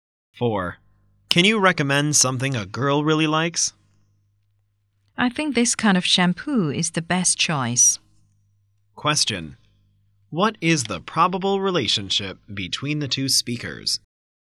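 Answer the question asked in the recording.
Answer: Shop assistant and customer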